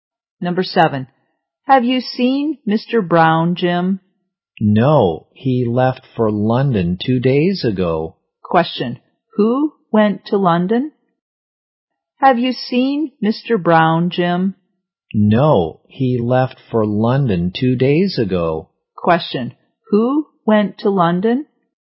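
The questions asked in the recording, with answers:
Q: Question, who went to London?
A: Mr. Brown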